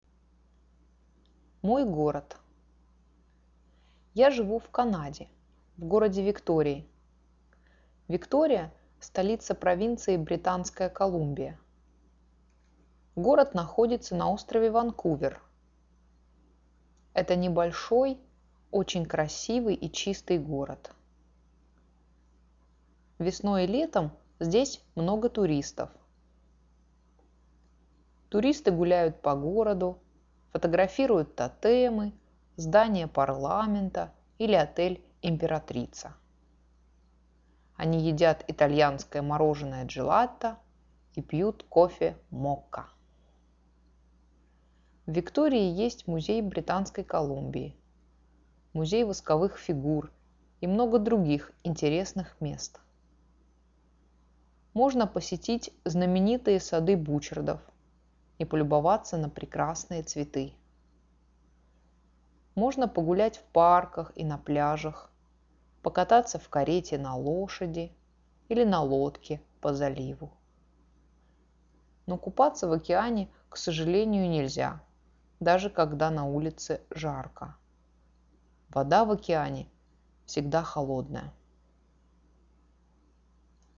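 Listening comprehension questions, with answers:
Now listen to the story and click on the statements that are TRUE.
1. Victoria is a very big city.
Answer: False

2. Sara lives in the capital of British Columbia.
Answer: True

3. Sara lives in the city of Vancouver.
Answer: False

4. Sara lives on Vancouver island.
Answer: True

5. There are many tourists in Victoria in the spring and summer time.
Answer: True

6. There is a museum of Wax Figures in Victoria.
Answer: True

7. You can swim in the ocean there.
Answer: False

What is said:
Я живу в Канаде, в городе Виктории.
Виктория – столица провинции Британская Колумбия.
Город находится на острове Ванкувер.
Это небольшой, очень красивый и чистый город.
Весной и летом здесь много туристов.
Туристы гуляют по городу, фотографируют тотемы, здание парламента или отель «Императрица».
Они едят итальянское мороженое «Джелатто» и пьют кофе «Мокка».
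В Виктории есть=>есть2 музей Британской Колумбии, музей восковых фигур и много других интересных мест.
Можно посетить знаменитые Сады Бучардов и полюбоваться на прекрасные цветы.
Можно погулять в парках и на пляжах, покататься в карете на лошади или на лодке по заливу.
Но купаться в океане, к сожалению, нельзя, даже когда на улице жарко.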